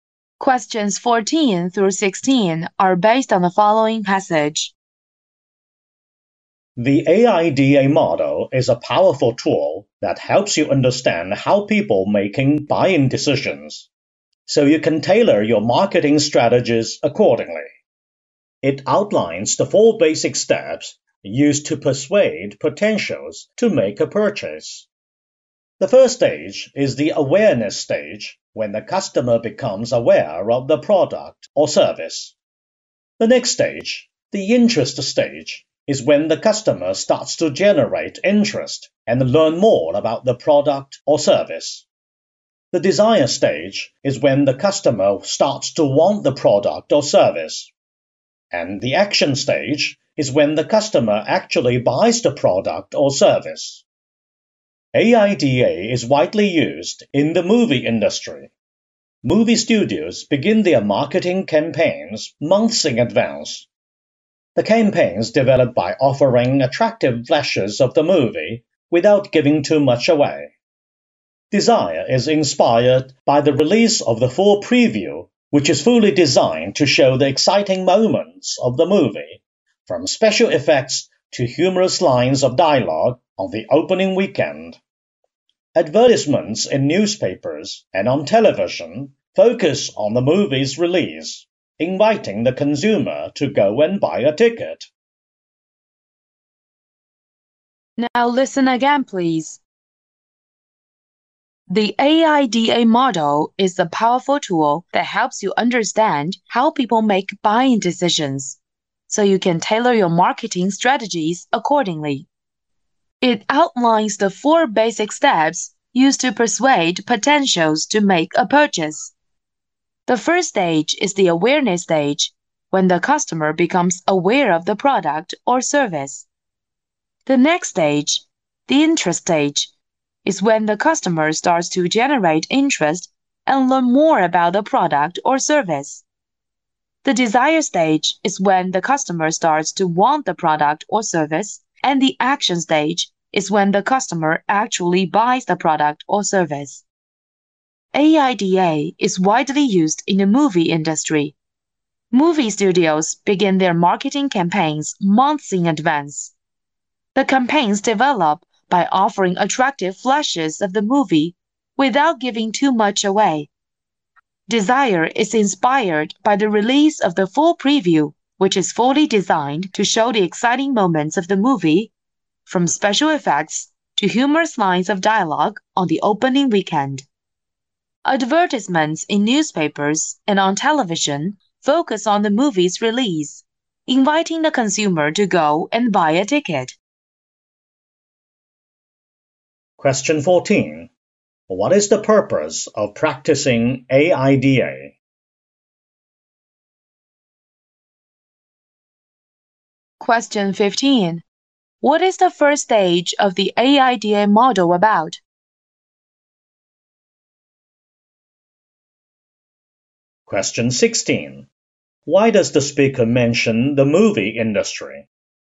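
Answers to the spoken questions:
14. To understand how people make buying decisions and tailor marketing strategies
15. The customer becoming aware of the product or service
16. To give an example of how AIDA is used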